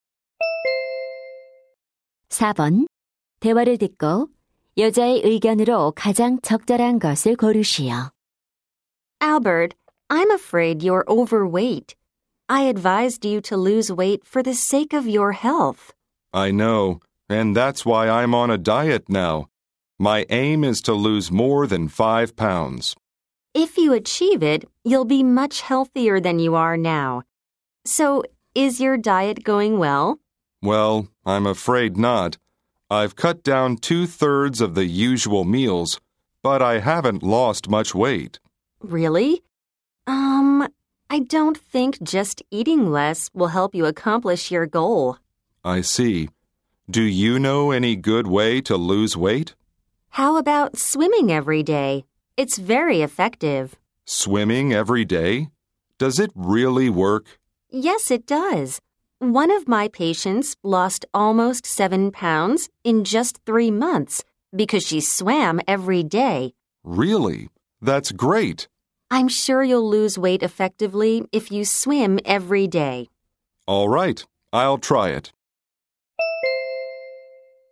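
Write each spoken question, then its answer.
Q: 대화를 듣고 여자의 의견으로 가장 적절한 것을 고르시오.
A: 매일 수영하는 것이 체중 감량에 효과적이다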